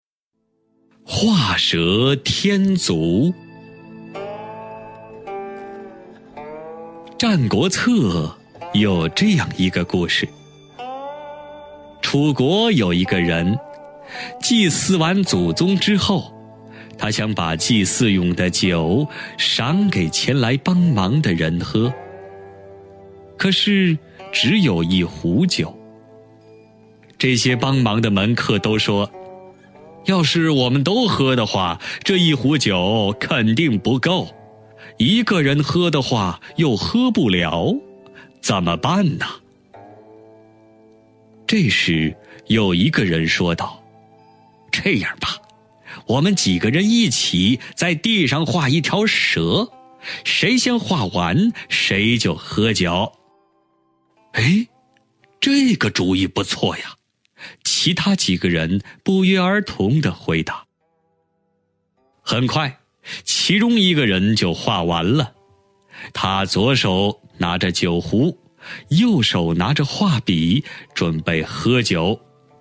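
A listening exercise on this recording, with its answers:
★音声を聞き、空欄〇に当てはまる単語を探して、授業内課題用紙に漢字とピンインを書いてください。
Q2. 《战国策》有这样一个〇〇。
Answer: 故事 (gùshi)

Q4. 祭祀完祖宗之后,他想把祭祀用的酒赏给前来〇〇的人喝。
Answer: 帮忙 (bāngmáng)

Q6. 这些〇〇的门客都说:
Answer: 帮忙 (bāngmáng)

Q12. 我们几个人〇〇在地上画一条蛇,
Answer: 一起 (yìqǐ)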